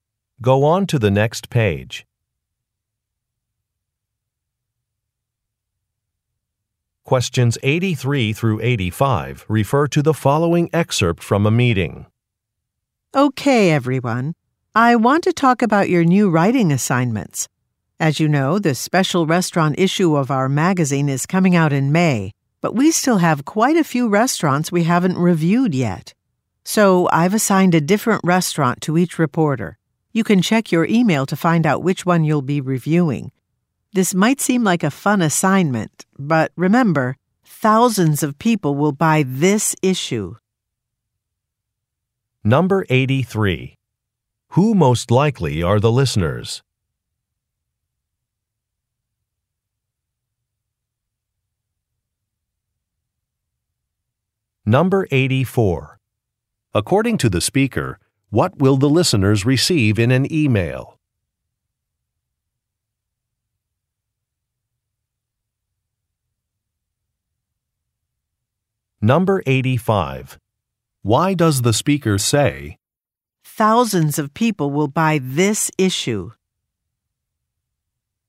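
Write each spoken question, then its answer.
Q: Who most likely are the listeners?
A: Magazine reporters

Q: According to the speaker, what will the listeners receive in an email?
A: The restaurant each will review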